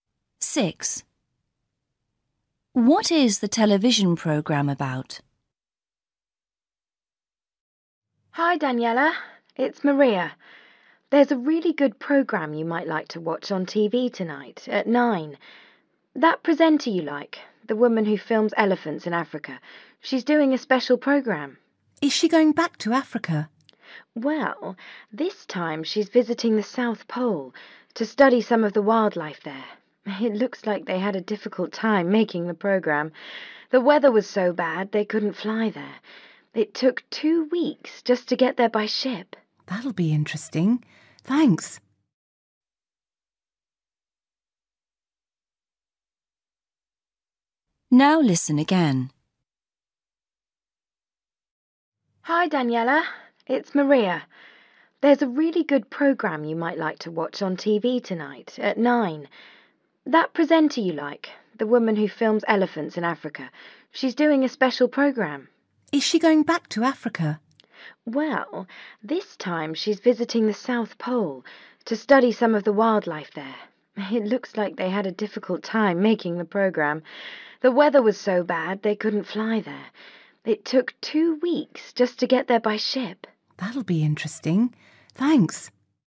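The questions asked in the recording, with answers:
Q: What is the television programme about?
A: wildlife at the South Pole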